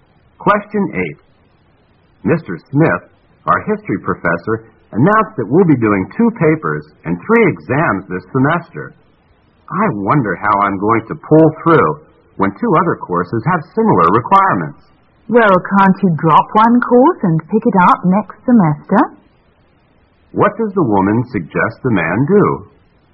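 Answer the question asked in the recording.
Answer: Drop one course and take it next semester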